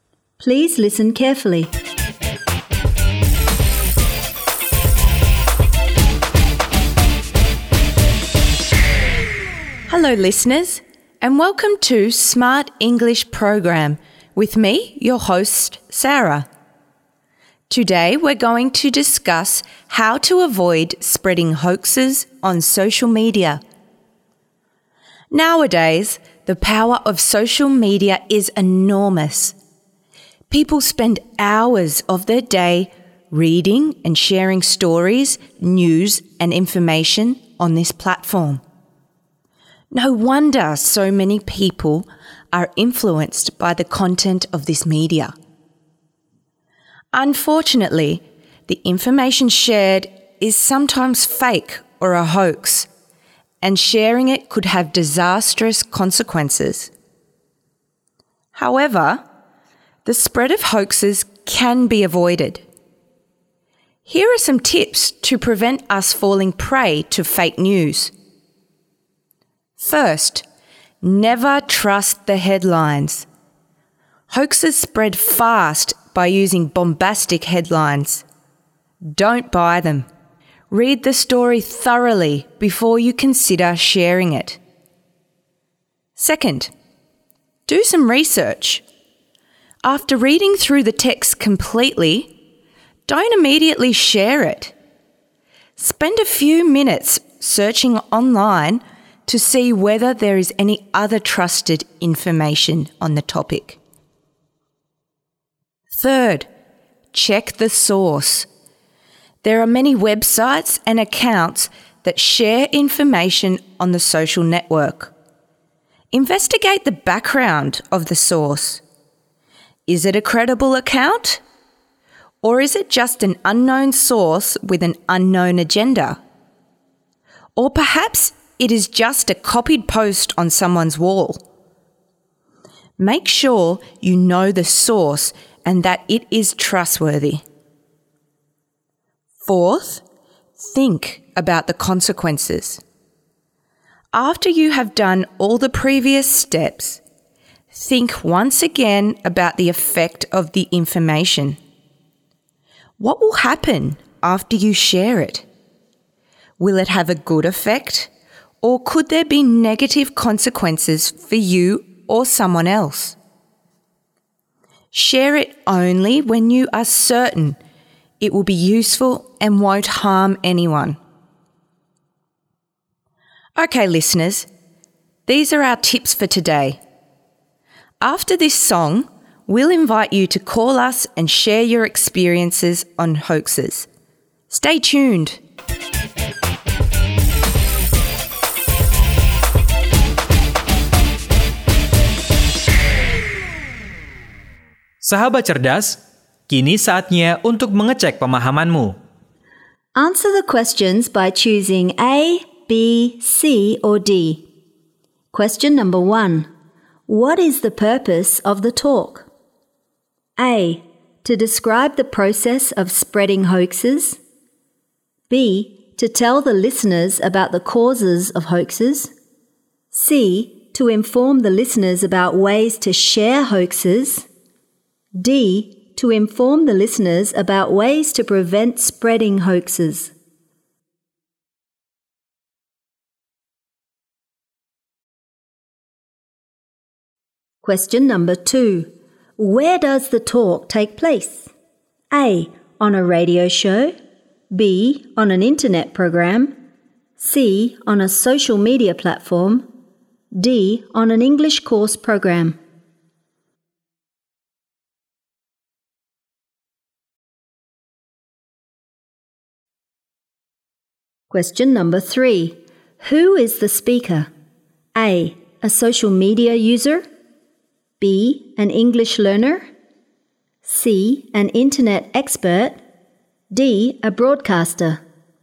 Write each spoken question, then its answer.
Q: What is the purpose of the talk?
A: D. To inform the listeners about ways to prevent spreading hoaxes.

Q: Where does the talk take place?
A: A. On a radio show.